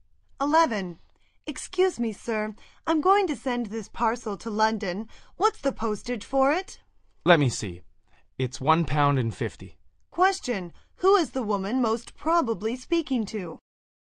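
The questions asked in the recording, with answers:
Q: Who is the woman most probably speaking to?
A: A post office clerk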